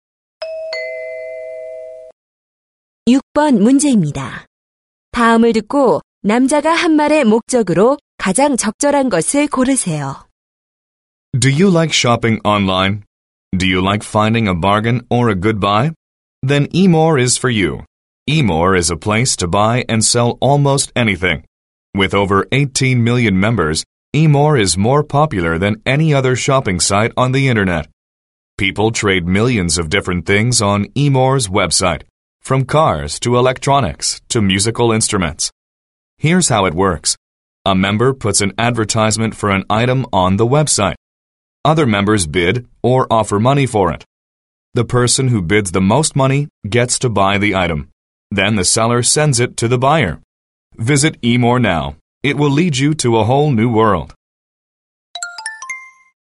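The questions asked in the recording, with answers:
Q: 다음을 듣고 남자가 한 말의 목적으로 가장 적절한 것을 고르세요.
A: 온라인 쇼핑(경매) 사이트 eMore 광고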